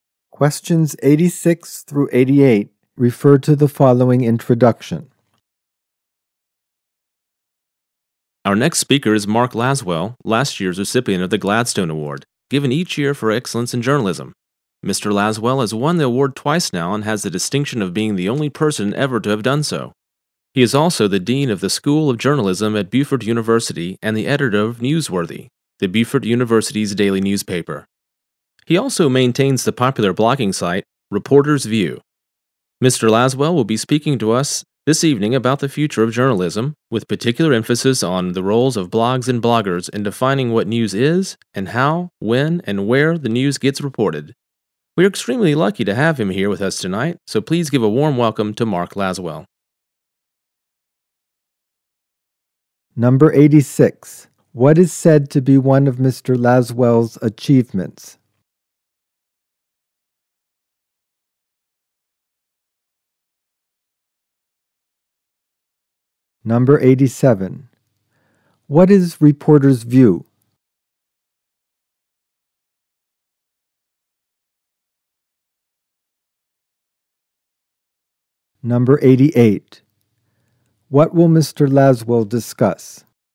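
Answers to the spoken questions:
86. He is the only person to have won the Gladstone Award twice
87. A popular blogging site
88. The future of journalism and the role of blogs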